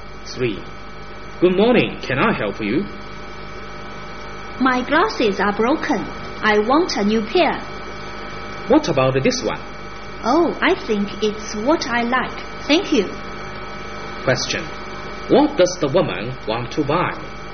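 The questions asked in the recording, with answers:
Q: What does the woman want to buy?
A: A new pair of glasses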